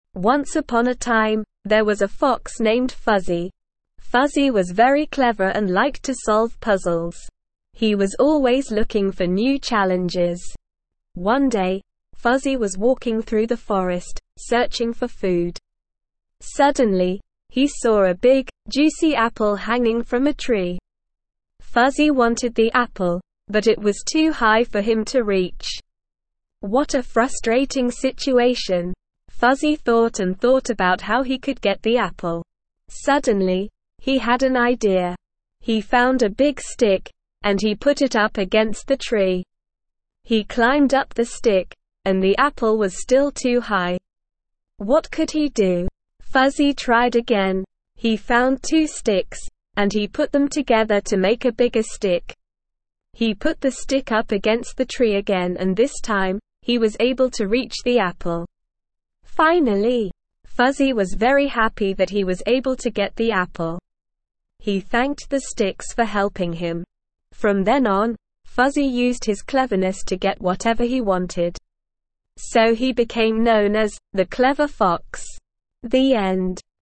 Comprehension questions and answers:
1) Fuzzy was a very _____ fox.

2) Fuzzy saw a _____ apple in a tree.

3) He tried to reach the apple, but it was _____ high.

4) Fuzzy found a _____ to help him.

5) He put the stick _____ the tree.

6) He found two sticks to make a _____ one.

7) Fuzzy was _____ to get the apple.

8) He thanked the _____ for helping him.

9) Fuzzy used his _____ to get what he wanted.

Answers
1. clever
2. juicy
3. too
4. stick
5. up against
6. bigger
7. very happy
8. sticks
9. cleverness

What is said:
Once upon a time, there was a fox named Fuzzy. Fuzzy was very clever and liked to solve puzzles. He was always looking for new challenges.
One day, Fuzzy was walking through the forest, searching for food. Suddenly, he saw a big, juicy apple hanging from a tree. Fuzzy wanted the apple, but it was too high for him to reach. What a frustrating situation!
Fuzzy thought and thought about how he could get the apple. Suddenly, he had an idea. He found a big stick, and he put it up against the tree. He climbed up the stick, and the apple was still too high. What could he do?
Fuzzy tried again. He found two sticks, and he put them together to make a bigger stick. He put the stick up against the tree again and this time, he was able to reach the apple. Finally!
Fuzzy was very happy that he was able to get the apple. He thanked the sticks for helping him. From then on, Fuzzy used his cleverness to get whatever he wanted. So he became known as "The Clever Fox".
The End.

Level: Level 2